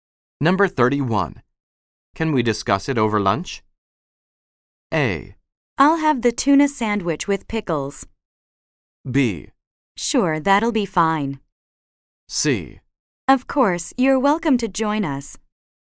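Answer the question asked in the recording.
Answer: B: Sure, that'll be fine.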